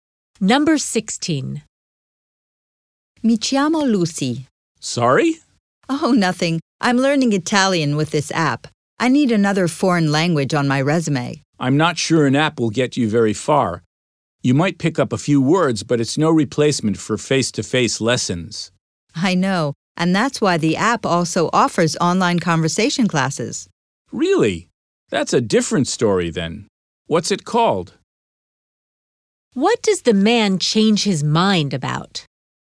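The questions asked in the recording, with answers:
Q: What does the man change his mind about?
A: Whether the language app is useful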